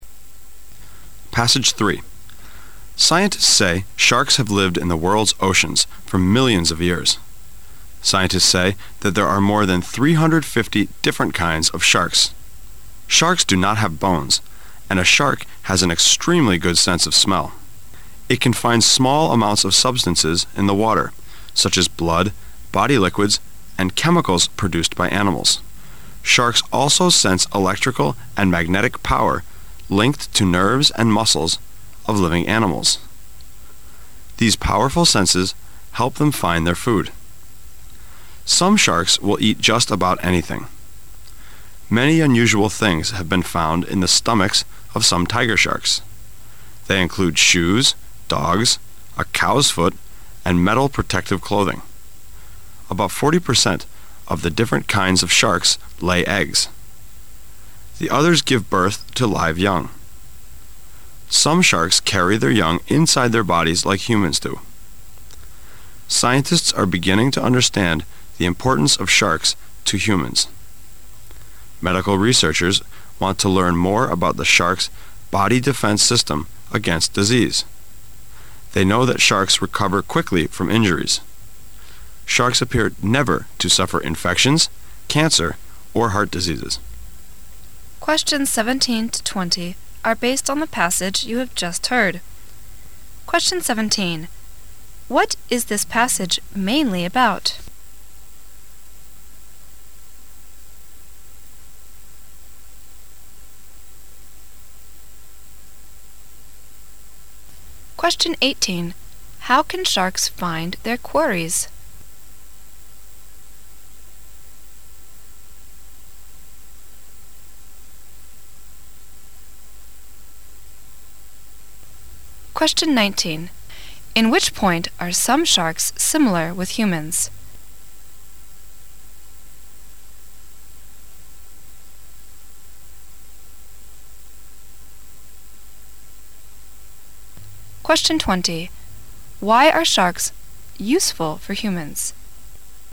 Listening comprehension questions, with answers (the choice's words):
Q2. How can sharks find their quarries?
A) By good sense of water waves made by quarries.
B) By good sense of smell and electrical magnetic power.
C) By good sense of light.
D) By good sense of blood.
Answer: By good sense of smell and electrical magnetic power.

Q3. In which point are some sharks similar with humans?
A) Bone structure.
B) Smell ability.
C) Birth mode.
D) Recover ability against disease.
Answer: Birth mode.

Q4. Why are sharks useful for humans?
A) Their tasty meat.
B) The principle of their defense system against disease.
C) Their solid skin.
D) The principle of their birth modes.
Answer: The principle of their defense system against disease.

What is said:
[解析] 17-20 Scientists say sharks have lived in the world's oceans for millions of years. Scientists say there are more than three-hundred-fifty different kinds of sharks. Sharks do not have bones, and a shark has an extremely good sense of smell. It can find small amounts of substances in the water, such as blood, body liquids and chemicals produced by animals. Sharks also sense electrical and magnetic power linked to nerves and muscles of living animals. These powerful senses help them find their food. Some sharks will eat just about anything. Many unusual things have been found in the stomachs of some tiger sharks. They include shoes, dogs, a cow's foot and metal protective clothing. About forty percent of the different kinds of sharks lay eggs. The others give birth to live young. Some sharks carry their young inside their bodies like humans do. Scientists are beginning to understand the importance of sharks to humans. Medical researchers want to learn more about the shark's body defense system against disease. They know that sharks recover quickly from injuries. Sharks appear never to suffer infections, cancer or heart diseases. What is this passage mainly about?